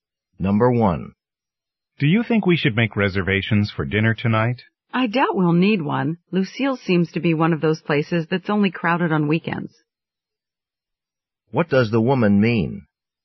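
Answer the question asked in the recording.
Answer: They probably don't need a reservation, since the restaurant is only crowded on weekends.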